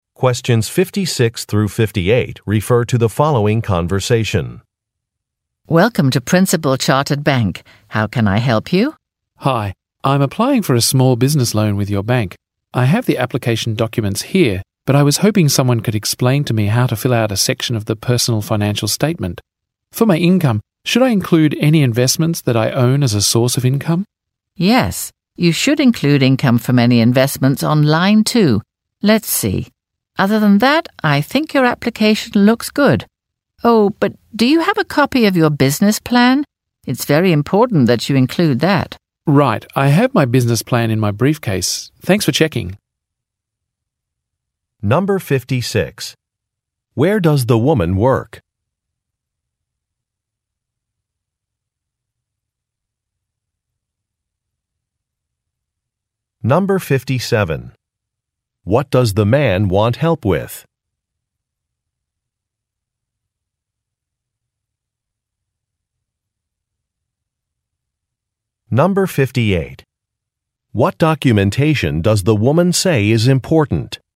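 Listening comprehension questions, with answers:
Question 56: Where does the woman work?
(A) At a library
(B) At a bank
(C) At a community center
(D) At a research foundation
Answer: (B) At a bank

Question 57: What does the man want help with?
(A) Completing some paperwork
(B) Registering for a workshop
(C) Inspecting some equipment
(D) Editing an article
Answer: (A) Completing some paperwork

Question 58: What documentation does the woman say is important?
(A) A list of investors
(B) A business plan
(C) An identification card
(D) A utility bill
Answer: (B) A business plan

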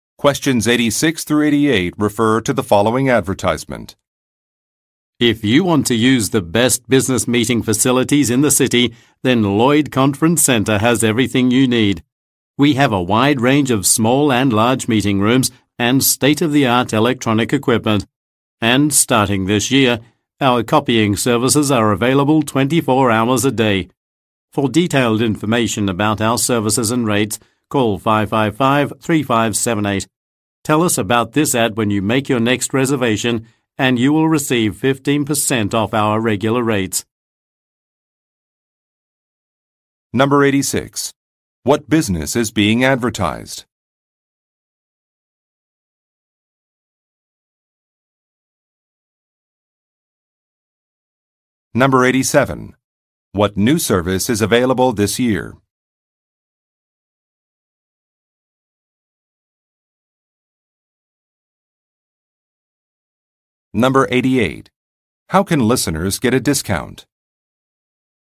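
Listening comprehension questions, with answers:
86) What business is being advertised?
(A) An electronics store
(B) An equipment rental shop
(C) A conference center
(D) A shipping company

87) What new service is available this year?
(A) 24-hour photocopying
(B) Online reservation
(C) Wireless internet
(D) Express delivery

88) How can listeners get a discount?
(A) By mentioning an advertisement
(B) By referring a friend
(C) By printing out a voucher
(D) By booking one month in advance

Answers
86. (C) A conference center
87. (A) 24-hour photocopying
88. (A) By mentioning an advertisement

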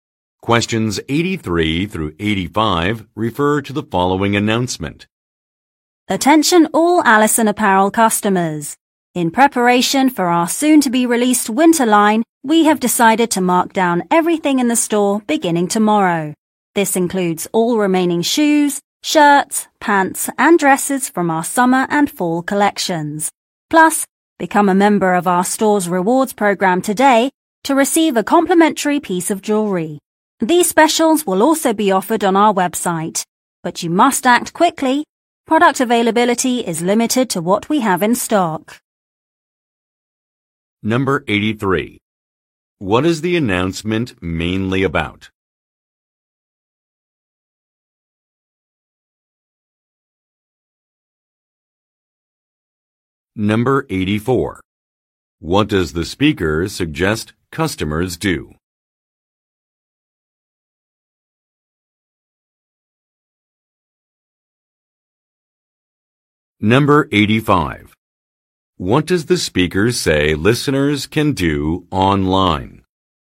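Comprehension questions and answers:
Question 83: What is the announcement mainly about?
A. A grand opening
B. A branch expansion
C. A product launch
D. A sales event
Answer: D. A sales event

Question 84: What does the speaker suggest customers do?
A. Become a member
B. Purchase a gift card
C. Download a flyer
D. Check out reviews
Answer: A. Become a member

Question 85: What does the speaker say listeners can do online?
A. Review recent purchases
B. Take advantage of deals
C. Read about an upcoming line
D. Request product exchanges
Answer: B. Take advantage of deals

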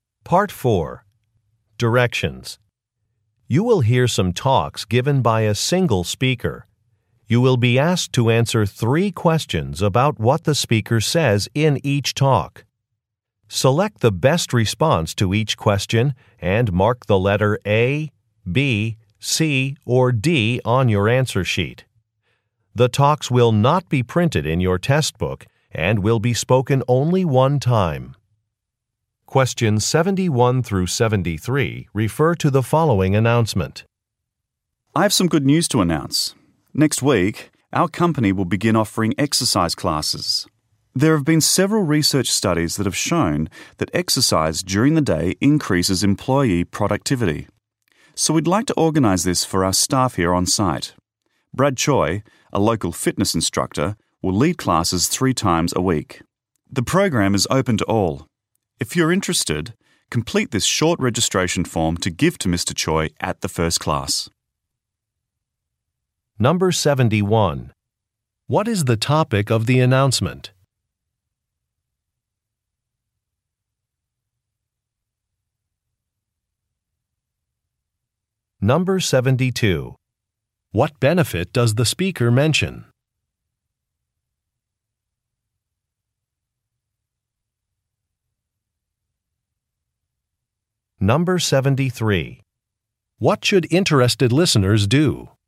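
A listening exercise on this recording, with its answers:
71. What is the topic of the announcement?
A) Healthy eating options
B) Exercise sessions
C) Professional-development courses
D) Volunteer opportunities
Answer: B) Exercise sessions

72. What benefit does the speaker mention?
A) Decreased expenses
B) Personal satisfaction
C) Increased productivity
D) Improved qualifications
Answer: C) Increased productivity

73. What should interested listeners do?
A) Fill out a form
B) Make a reservation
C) Send a text message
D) Get a supervisor's approval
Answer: A) Fill out a form

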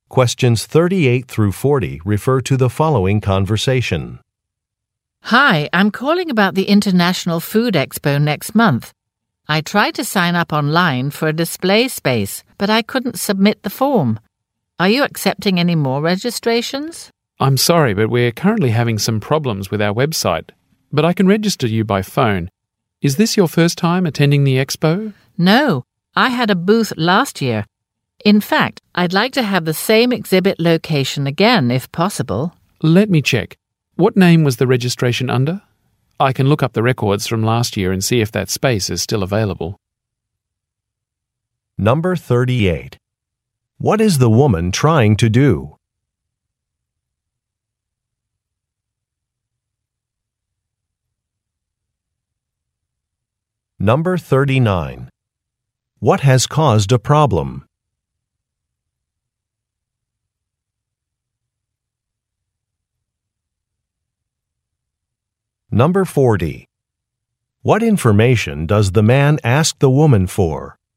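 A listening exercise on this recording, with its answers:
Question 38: What is the woman trying to do?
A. Confirm an appointment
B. Receive a refund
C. Book a flight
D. Register for an event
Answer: D. Register for an event

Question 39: What has caused a problem?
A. A business is closed.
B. A Web site is not working.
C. A credit card has expired.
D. A date is incorrect.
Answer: B. A Web site is not working.

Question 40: What information does the man ask the woman for?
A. A name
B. An address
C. A password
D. A tracking number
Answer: A. A name

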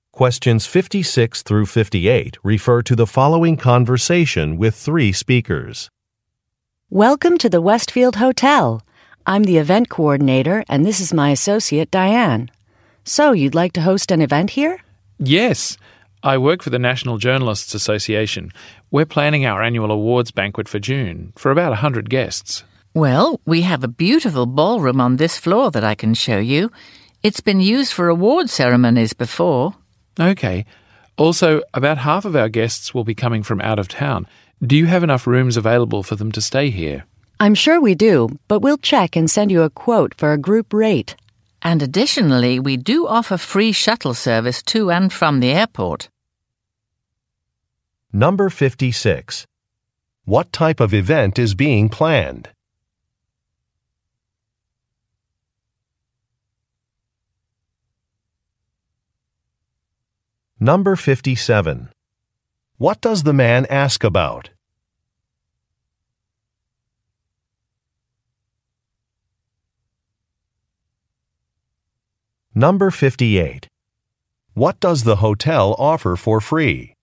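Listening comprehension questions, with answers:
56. What type of event is being planned?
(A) A trade show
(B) An awards ceremony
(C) A film festival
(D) A wedding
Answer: (B) An awards ceremony

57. What does the man ask about?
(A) Accommodations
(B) Entertainment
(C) Meal options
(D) Outdoor seating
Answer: (A) Accommodations

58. What does the hotel offer for free?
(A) Meals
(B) Internet access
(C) Transportation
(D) Parking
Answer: (C) Transportation

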